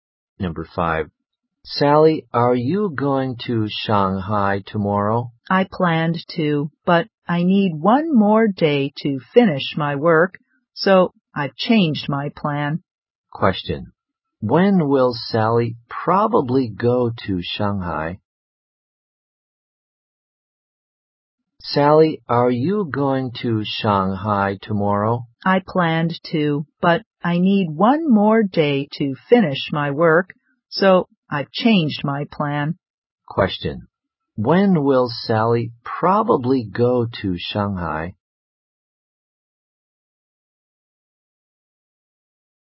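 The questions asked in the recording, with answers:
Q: When will Sally probably go to Shanghai?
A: The day after tomorrow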